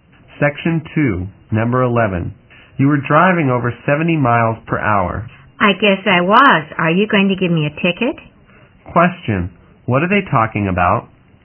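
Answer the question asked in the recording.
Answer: The man was speeding (driving over 70 miles per hour) and may get a ticket.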